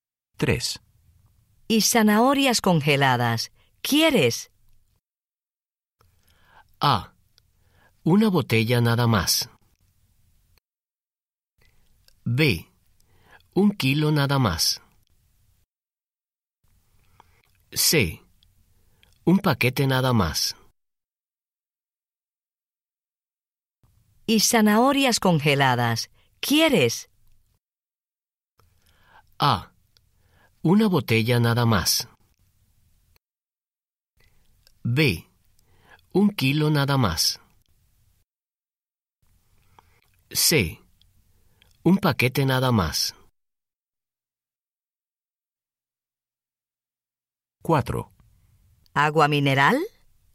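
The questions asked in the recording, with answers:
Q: Y zanahorias congeladas, ¿quieres?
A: C: Un paquete nada más.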